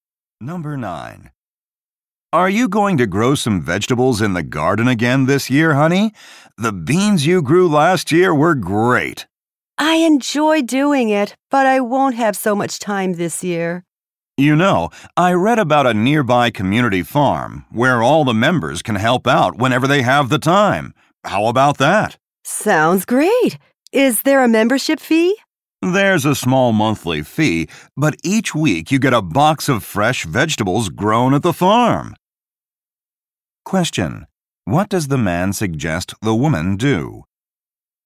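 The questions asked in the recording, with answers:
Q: Question. What does the man suggest the woman do?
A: Join a nearby community farm.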